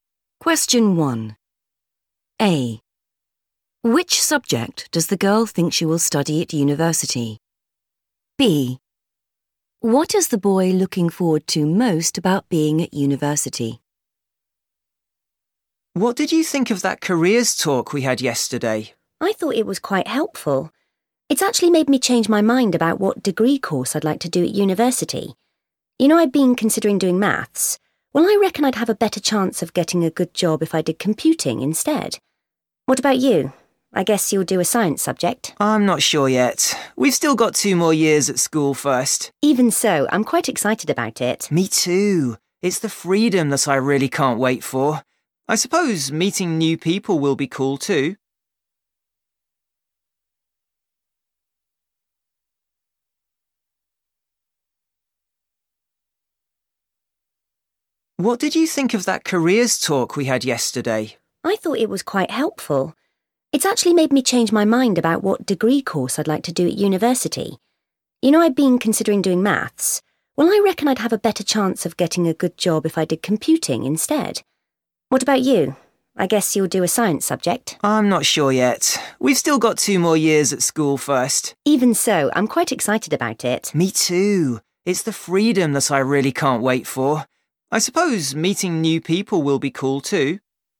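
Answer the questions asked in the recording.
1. computing
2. the freedom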